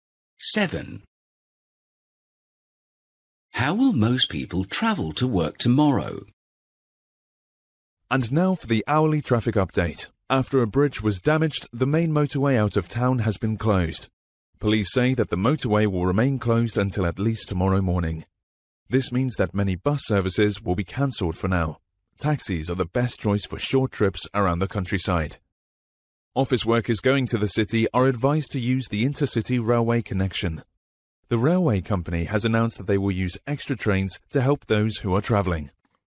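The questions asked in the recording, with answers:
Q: How will most people travel to work tomorrow?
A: By train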